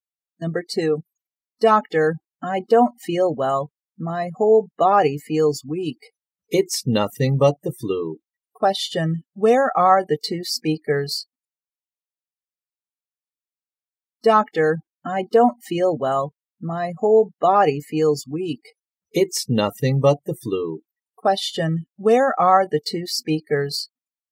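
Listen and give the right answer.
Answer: In a hospital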